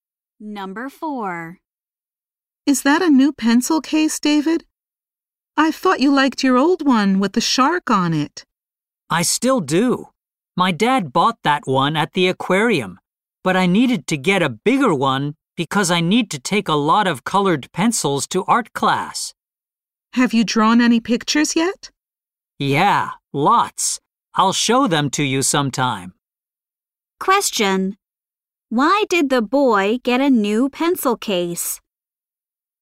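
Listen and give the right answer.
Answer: He needed a bigger one for his colored pencils for art class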